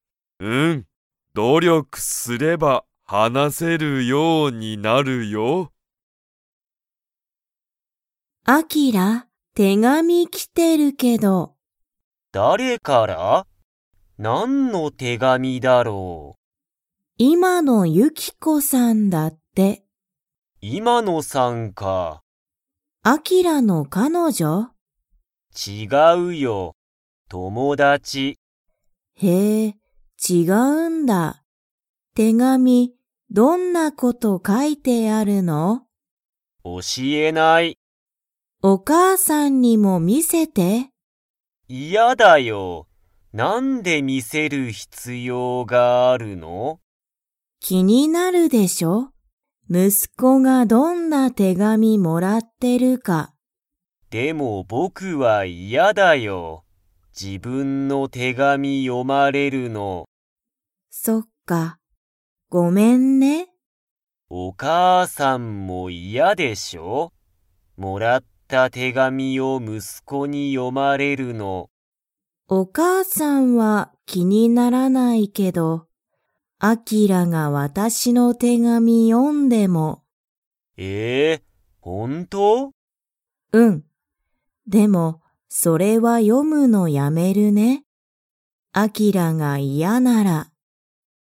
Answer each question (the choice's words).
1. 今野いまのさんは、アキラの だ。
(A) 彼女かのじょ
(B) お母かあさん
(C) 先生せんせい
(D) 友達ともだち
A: 友達ともだち

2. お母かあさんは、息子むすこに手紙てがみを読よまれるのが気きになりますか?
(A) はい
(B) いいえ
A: いいえ

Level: Level 3